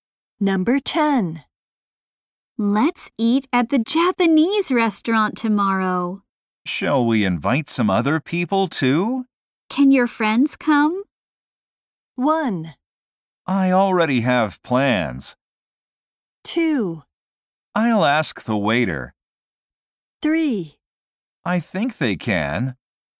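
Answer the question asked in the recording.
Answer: 3: I think they can.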